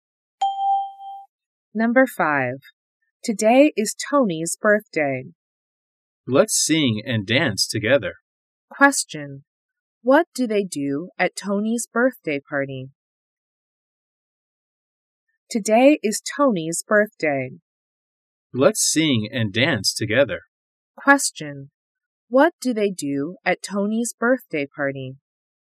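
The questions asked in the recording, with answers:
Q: What do they do at Tony's birthday party?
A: They sing and dance.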